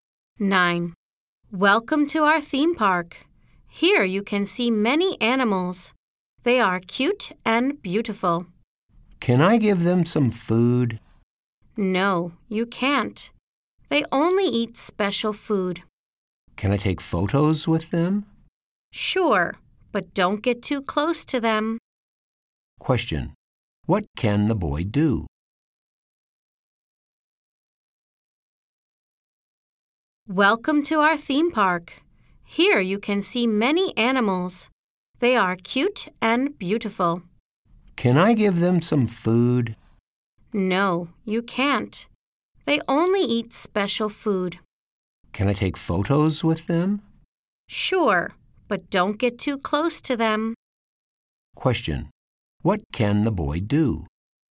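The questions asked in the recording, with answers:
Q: What can the boy do?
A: Take photos with the animals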